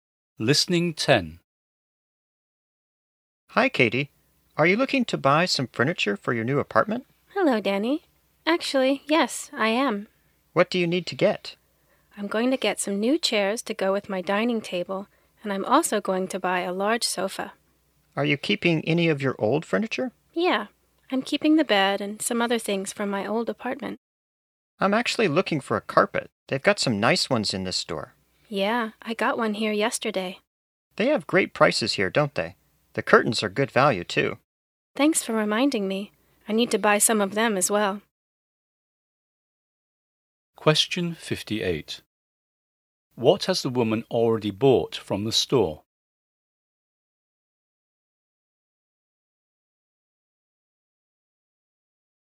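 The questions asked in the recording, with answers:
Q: What has the woman already bought from the store?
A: A carpet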